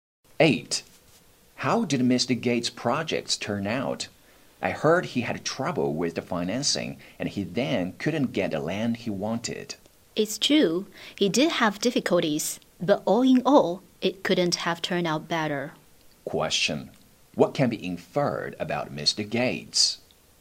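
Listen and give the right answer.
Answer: His projects turned out very well despite difficulties.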